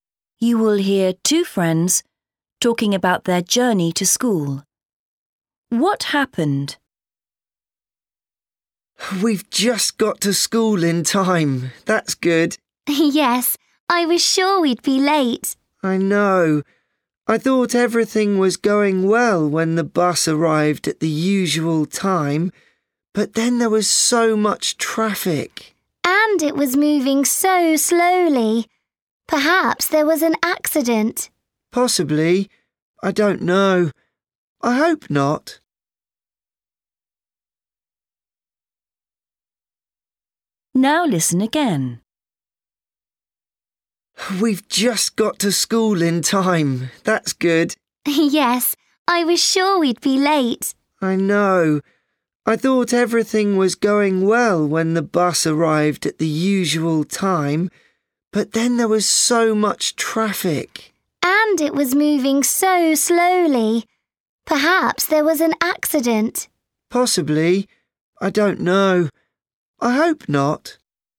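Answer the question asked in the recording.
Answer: There was a lot of slow traffic, but they got to school just in time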